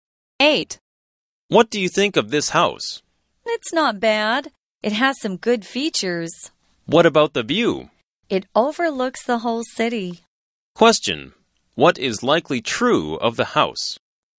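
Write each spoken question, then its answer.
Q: What is likely true of the house?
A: It has a view over the whole city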